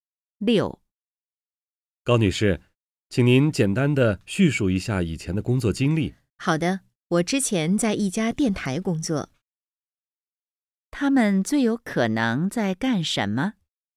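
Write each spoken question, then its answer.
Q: 他们最有可能在干什么?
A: 面试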